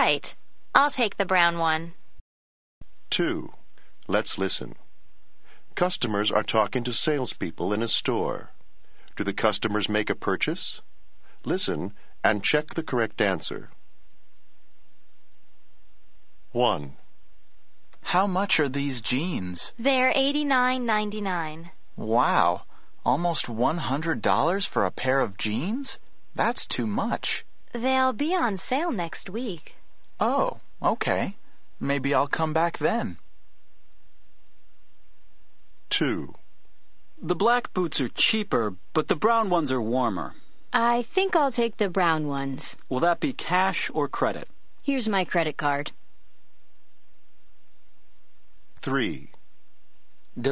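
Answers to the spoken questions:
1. No
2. Yes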